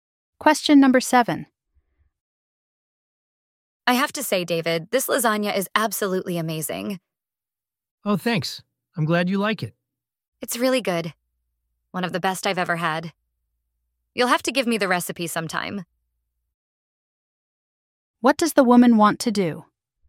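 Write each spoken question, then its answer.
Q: What does the woman want to do?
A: Get the lasagna recipe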